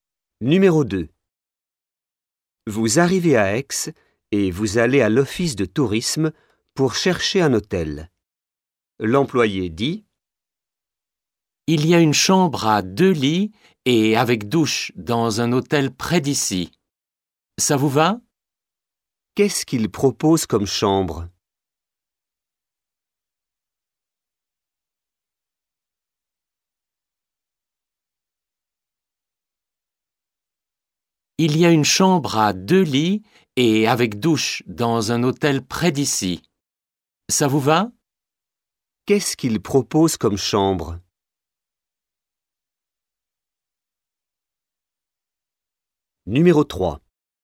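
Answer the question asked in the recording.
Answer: Une chambre à deux lits avec douche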